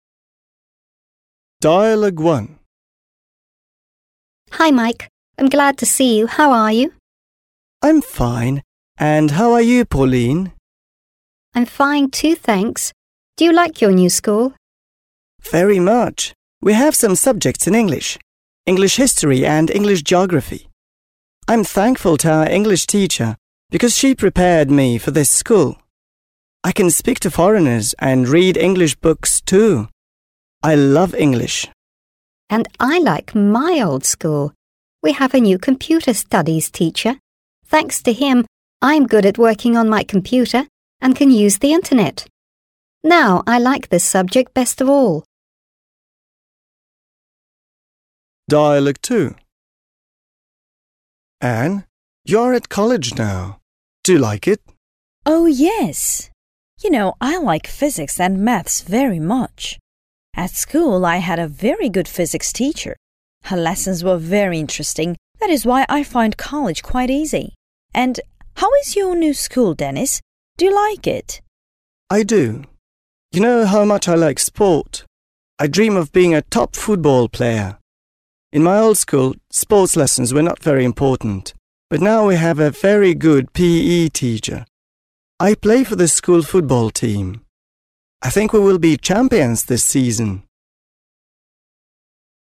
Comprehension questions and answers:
Listen and decide what their favourite subjects are.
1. Pauline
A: Her favourite subject is Computer Studies.

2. Mike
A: His favourite subject is English.

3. Ann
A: Her favourite subjects are Physics and Maths.

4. Denis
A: His favourite subject is Physical Education.

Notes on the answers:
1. Это можно понять из того, что она говорит о своём любимом предмете, который связан с информационными технологиями. Задание подразумевает, что вы слушаете аудиофайл или текст, где конкретный человек упоминает, что ему нравится изучать, в данном случае это «информатика».
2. Майк упоминает, что он учит английский и именно этот предмет является для него самым любимым. В контексте задания важно понимать, что любимый предмет — это тот, который человек находит наиболее интересным и важным для себя, а также он часто связан с его учебными достижениями или интересами.
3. Анна упоминает два предмета, что важно, так как задание проверяет внимание к деталям. Здесь, как и в других случаях, мы ищем то, что человек особенно ценит в своём образовательном процессе. В данном случае, она любит «физику» и «математику».
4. Денис говорит о спорте и физической культуре, как о своём любимом предмете. Это указывает на его увлечение физической активностью, что также подчеркивает его интерес к спортивным занятиям.

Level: 7 класс